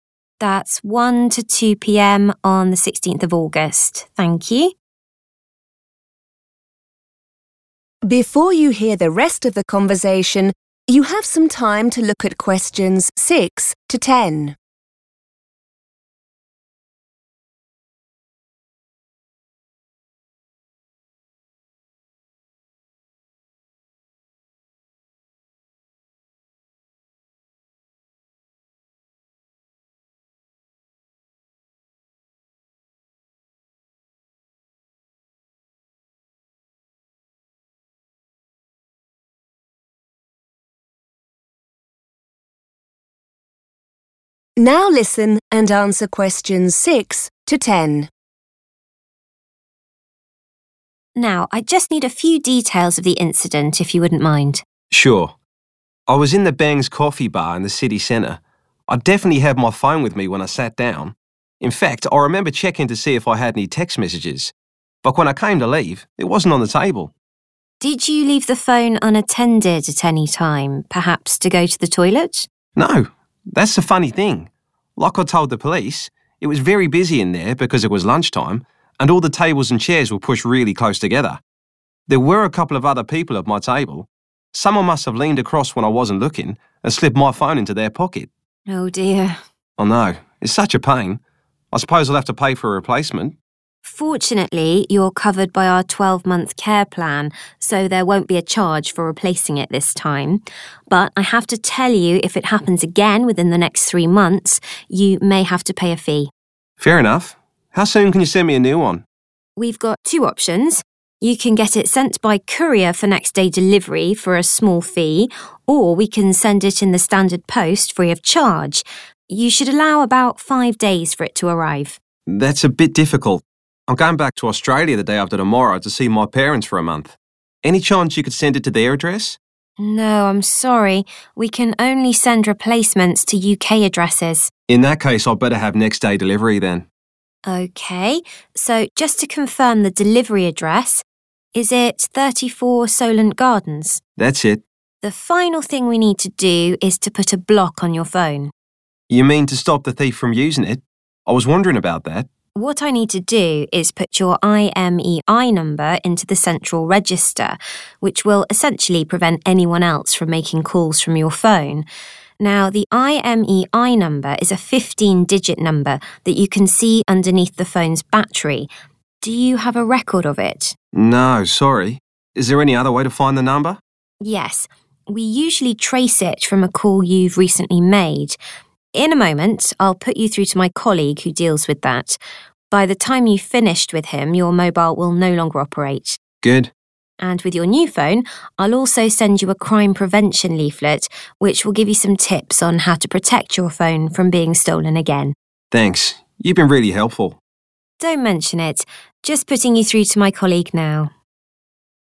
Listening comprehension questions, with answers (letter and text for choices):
Choose the correct letter, A, B or C.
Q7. The caller will have to pay a charge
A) for a new phone.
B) if his phone is stolen again.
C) in 12 months' time.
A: B) if his phone is stolen again.

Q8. The delivery address is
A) 34 Solent Gardens.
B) 34 Solent House.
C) 34 Solent Grove.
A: A) 34 Solent Gardens.

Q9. The caller's IMEI number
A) can be found on the side of the phone battery.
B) is made up of 15 digits.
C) cannot be found.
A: B) is made up of 15 digits.

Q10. The operator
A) transfers the caller to a colleague.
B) will ring the caller back the next day.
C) asks the caller to ring back.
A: A) transfers the caller to a colleague.

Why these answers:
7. The correct answer is B because the operator informs the caller that his current replacement is free due to his 'Care Plan'. However, the operator warns him that he might have to pay a 'fee' (a synonym for 'charge') if his phone is stolen again within the next three months. This matches the condition in option B.
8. The correct answer is Option A because at the end of the call, the operator asks the caller to confirm his delivery address. She clearly says "34 Solent Gardens" and the caller agrees by saying "That's it." The word "confirm" means to check if information is right or true, and the phrase "that's it" is a common way to say "that is correct."
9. The correct answer is B because the operator clearly states that the IMEI is a "15-digit number". The other options are incorrect: the transcript says the number is "underneath" the battery, not on the "side" (making A wrong), and while the caller does not have written record of it, the operator says they can "trace it" from a call, meaning it is not impossible to find (making C wrong).
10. The correct answer is A because the operator tells the caller she is connecting him to a teammate. She uses the words 'put you through,' which is a synonym for 'transfer' or connecting a person to another line on the phone.

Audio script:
Caller: That's it.
Operator: Just a few more details. Can I have your IMEI number?
Caller: Oh, what's that?
Operator: It's the International Mobile Equipment Identity number. It's a—
Caller: Sorry, I don't have it.
Operator: Not to worry – we'll deal with that in a moment. I just need to have the date and time your mobile was stolen.
Caller: That's easy. Between 1 and 2 o'clock yesterday.
Operator: That's 1 to 2pm on 16th August. Thank you. Now, I just need a few details of the incident if you wouldn't mind.
Caller: Sure. I was in the Bangs Coffee Bar in the city centre. I definitely had my phone with me when I sat down. In fact I remember checking to see if I had any text messages. But when I came to leave it wasn't on the table.
Operator: Did you leave the phone unattended at any time, perhaps to go to the toilet?
Caller: No, that's the funny thing. Like I told the police, it was very busy in there because it was lunchtime and all the tables and chairs were pushed really close together. There were a couple of other people at my table. Someone must have leaned across when I wasn't looking and slipped my phone into their pocket.
Operator: Oh dear.
Caller: I know. It's such a pain. I suppose I'll have to pay for a replacement?
Operator: Fortunately you're covered by our 12-month Care Plan so there won't be a charge for replacing it this time. But I have to tell you if it happens again within the next three months you may have to pay a fee.
Caller: Fair enough. How soon can you send me a new one?
Operator: We've got two options. You can get it sent by courier for next-day delivery for a small fee or we can send it in the standard post free of charge. You should allow about five days for it to arrive.
Caller: That's a bit difficult. I'm going back to Australia the day after tomorrow to see my parents for a month. Any chance you could send it to their address?
Operator: No, I'm sorry. We can only send replacements to UK addresses.
Caller: In that case I'd better have next-day delivery then.
Operator: Okay, so just to confirm the delivery address ... Is it 34 Solent Gardens?
Caller: That's it.
Operator: The final thing we need to do is to put a block on your phone.
Caller: You mean to stop the thief from using it? I was wondering about that.
Operator: What I need to do is put your IMEI number into the Central Register, which will essentially prevent anyone else from making calls from your phone. Now the IMEI number is a 15-digit number that you can see underneath the phone's battery. Do you have a record of it?
Caller: No, sorry. Is there any other way to find the number?
Operator: Yes. We usually trace it from a call you've recently made. In a moment I'll put you through to my colleague who deals with that. By the time you've finished with him your mobile will no longer operate.
Caller: Good.
Operator: And with your new phone I'll also send you a Crime Prevention leaflet, which will give you some tips on how to protect your phone from being stolen again.
Caller: Thanks, you've been really helpful.
Operator: Don't mention it. Just putting you through to my colleague now ...